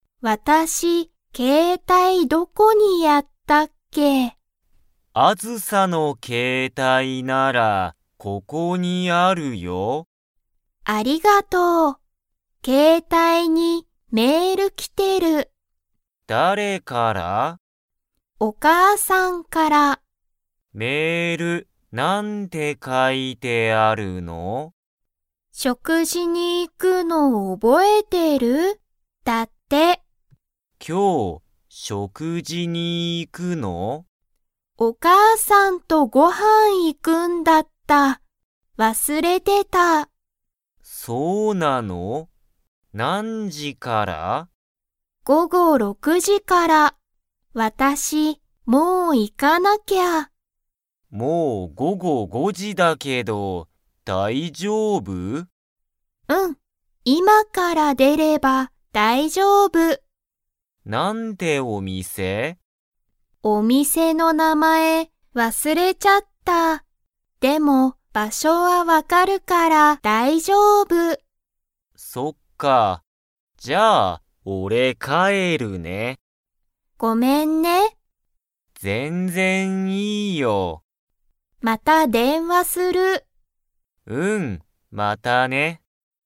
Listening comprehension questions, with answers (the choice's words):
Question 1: 誰だれからメールが来きましたか?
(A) アズサの友達ともだち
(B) タクヤの友達ともだち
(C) アズサのお母かあさん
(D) タクヤのお父とうさん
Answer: アズサのお母かあさん

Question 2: アズサは、お店みせの名前なまえを 。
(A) 忘わすれた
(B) 忘わすれていない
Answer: 忘わすれた

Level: Level 3